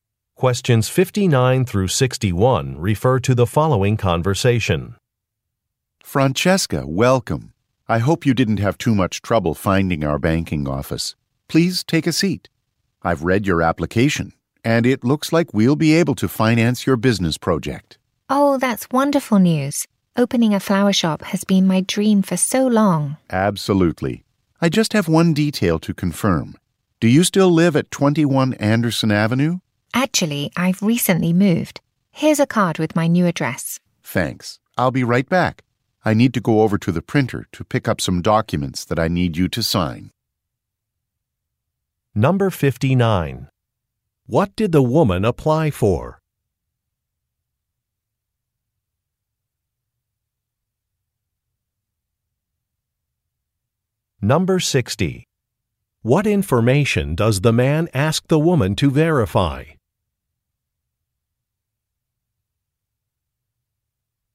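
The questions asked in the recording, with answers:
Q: What did the woman apply for?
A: A business loan

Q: What information does the man ask the woman to verify?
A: Her address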